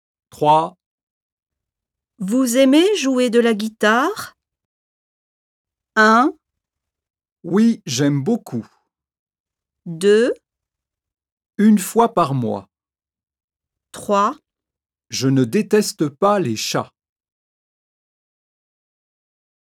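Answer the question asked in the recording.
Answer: 1: Oui, j'aime beaucoup.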